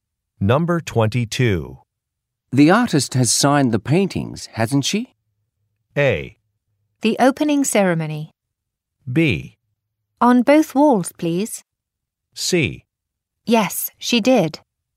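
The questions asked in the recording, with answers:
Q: The artist has signed the paintings, hasn't she?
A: C: Yes, she did.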